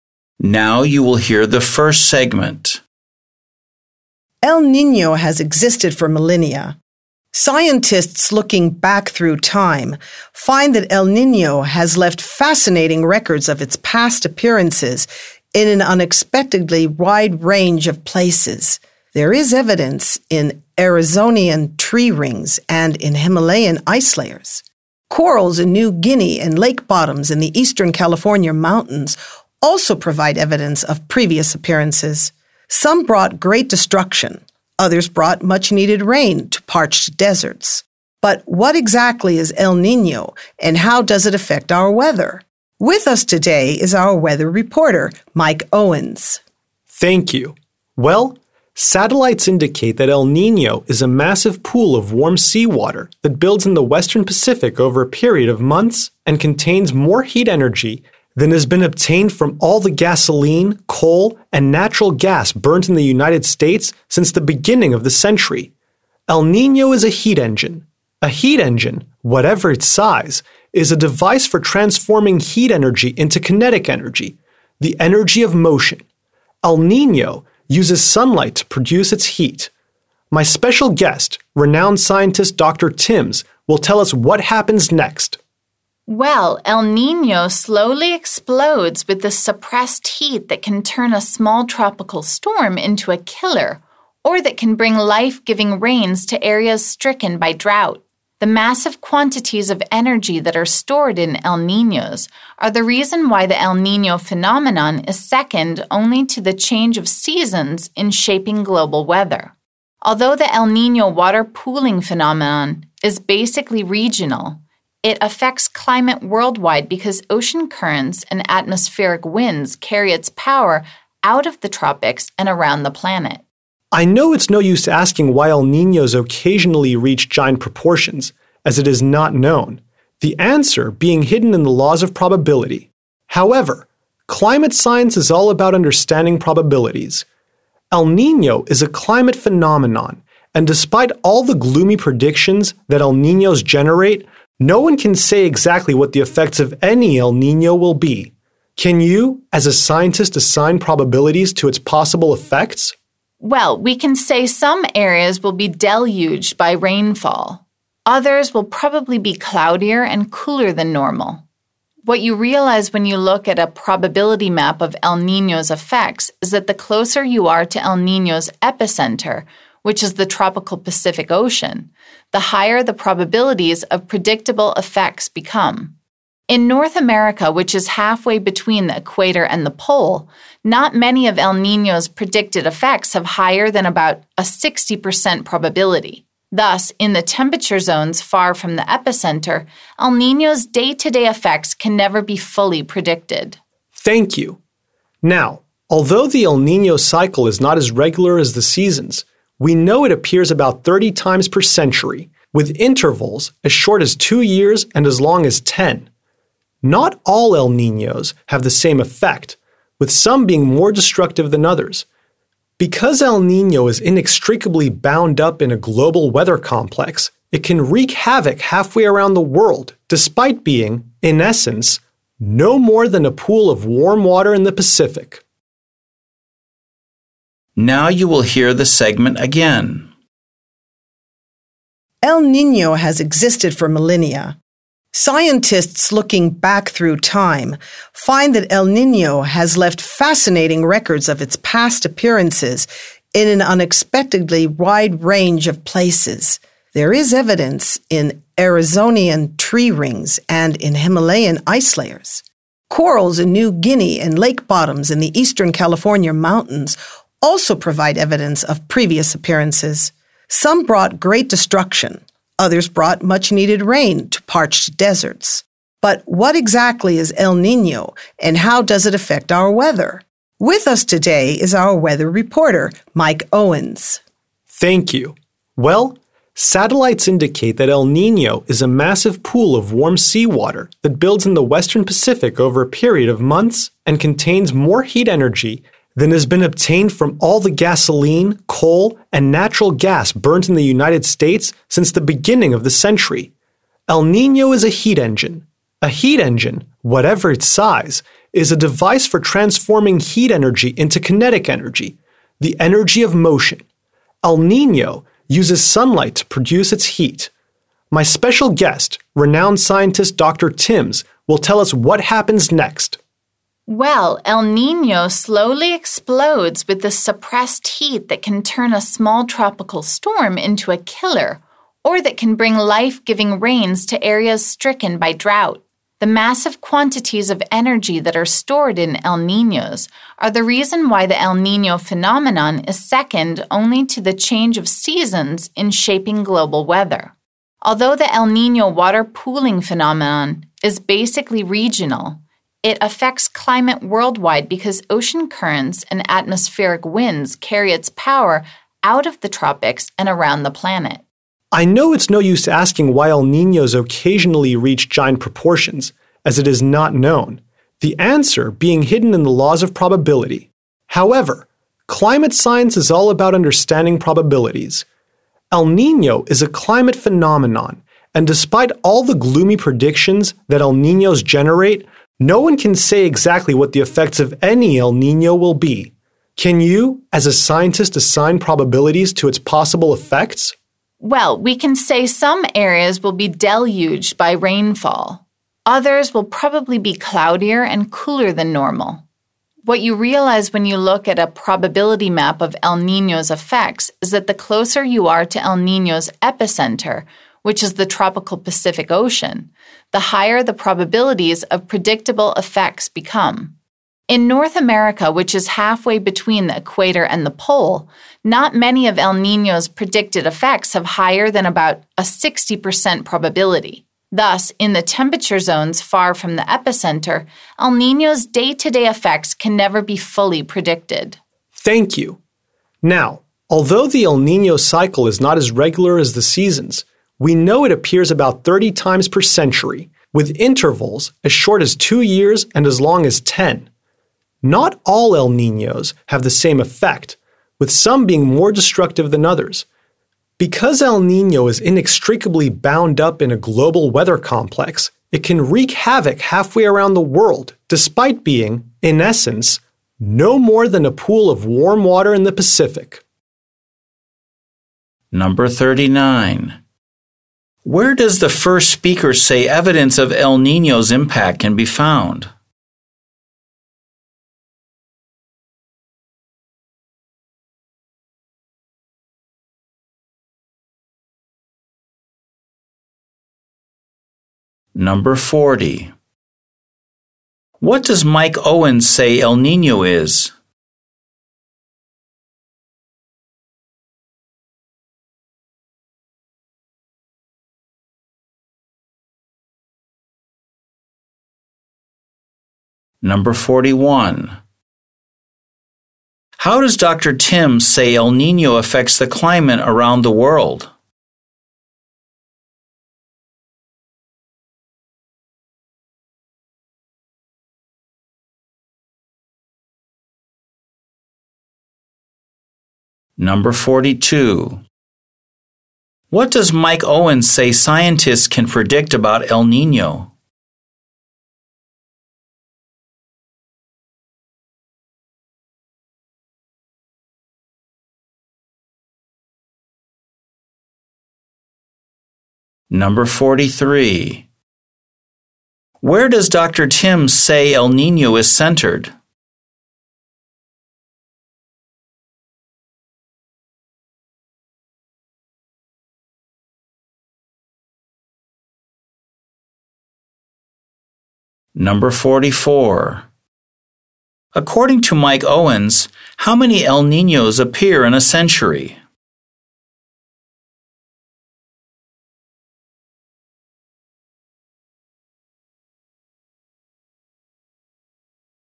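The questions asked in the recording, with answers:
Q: Where does the first speaker say evidence of El Niño's impact can be found?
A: In Arizona tree rings, Himalayan ice layers, New Guinea corals and lake bottoms in the eastern California mountains

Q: What does Mike Owens say El Niño is?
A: A massive pool of warm seawater that works as a heat engine

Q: How does Dr. Timms say El Niño affects the climate around the world?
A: Ocean currents and atmospheric winds carry its power out of the tropics and around the planet

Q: Tim say El Niño is centered?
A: In the tropical Pacific Ocean

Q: According to Mike Owens, how many El Niños appear in a century?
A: About 30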